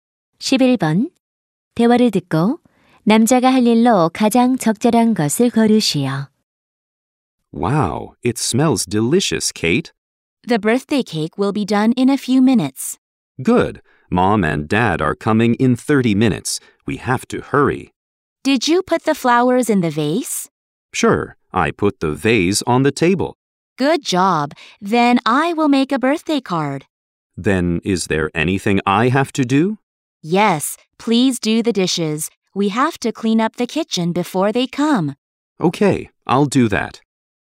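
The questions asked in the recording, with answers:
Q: 대화를 듣고 남자가 할 일로 가장 적절한 것을 고르시오.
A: 설거지하기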